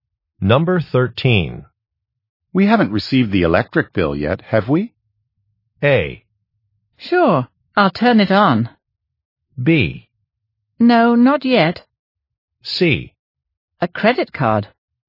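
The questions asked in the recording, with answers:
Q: We haven't received the electric bill yet, have we?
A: B: No, not yet.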